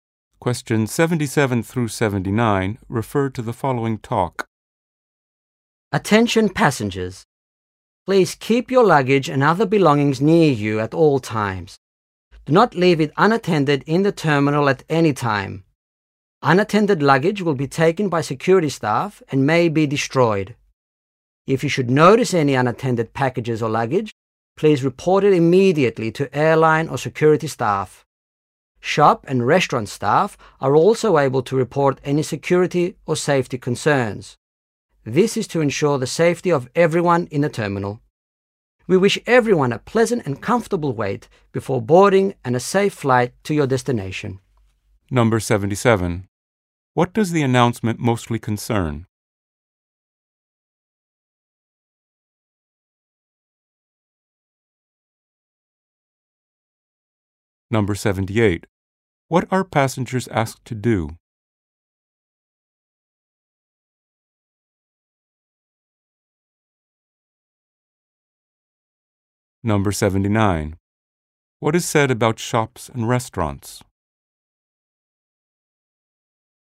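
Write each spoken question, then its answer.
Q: What does the announcement mostly concern?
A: Airport luggage security

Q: What are passengers asked to do?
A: Keep their luggage with them and report unattended bags

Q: What is said about shops and restaurants?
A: Their staff can report security concerns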